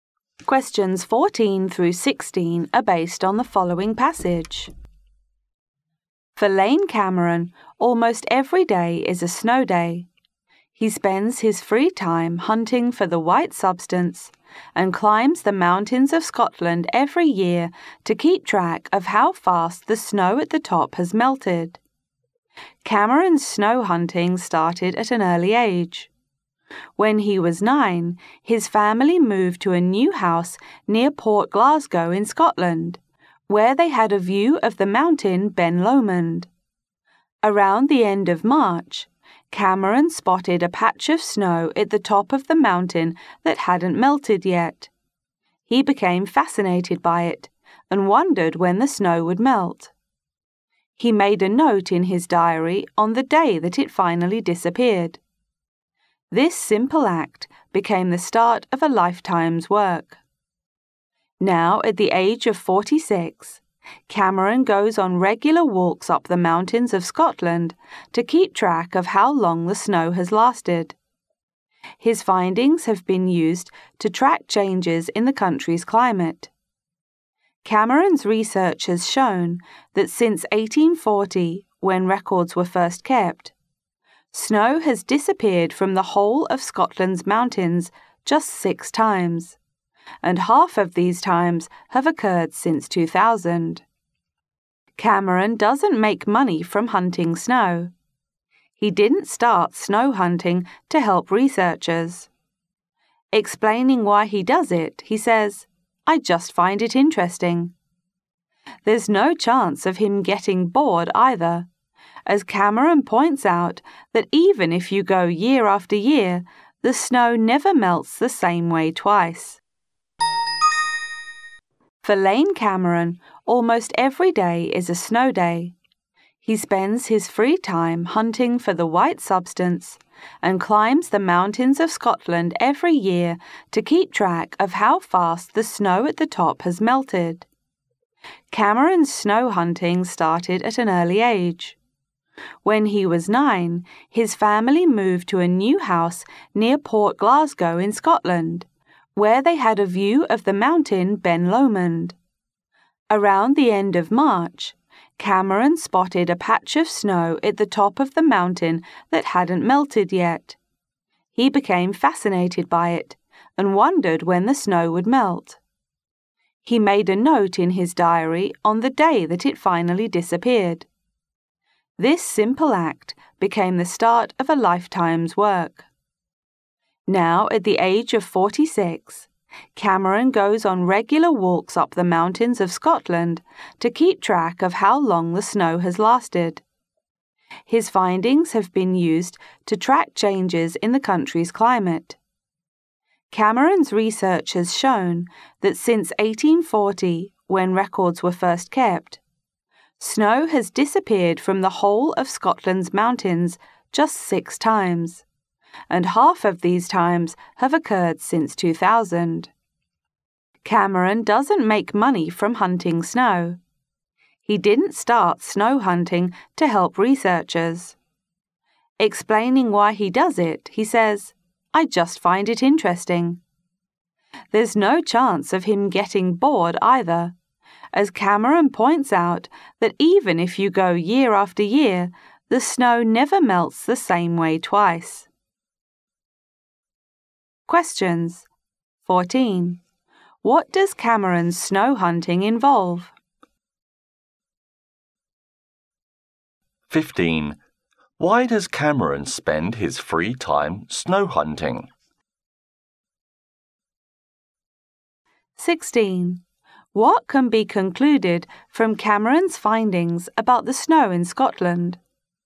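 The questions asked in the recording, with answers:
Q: What does Cameron's snow hunting involve?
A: Climbing Scotland's mountains to track how fast the snow melts

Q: Why does Cameron spend his free time snow hunting?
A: He finds it interesting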